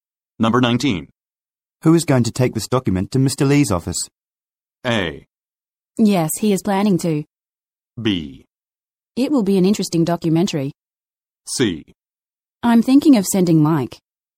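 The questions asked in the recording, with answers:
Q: Who is going to take this document to Mr. Lee's office?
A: C: I'm thinking of sending Mike.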